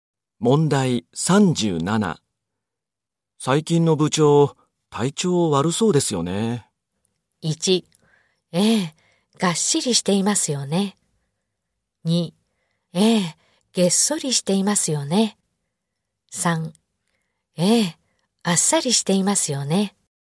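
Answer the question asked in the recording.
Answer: 2: ええ、げっそりしていますよね。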